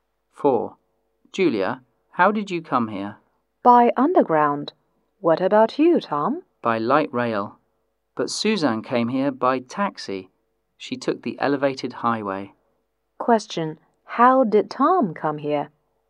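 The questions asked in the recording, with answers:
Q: How did Tom come here?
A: By light rail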